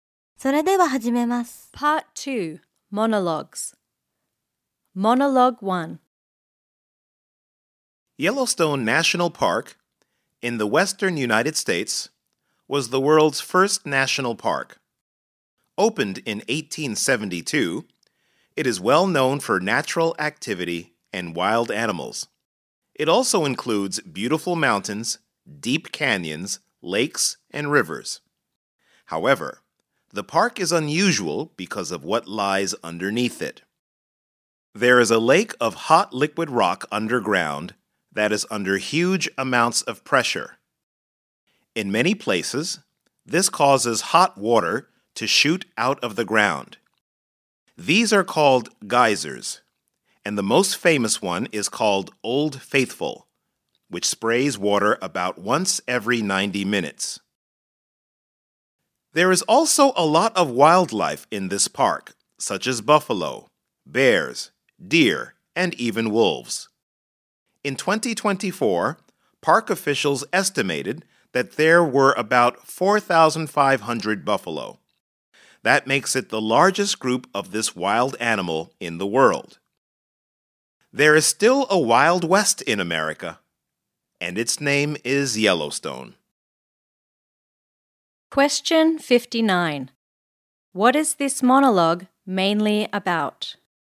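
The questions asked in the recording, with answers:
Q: What is this monologue mainly about?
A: Yellowstone National Park, the world's first national park, and its features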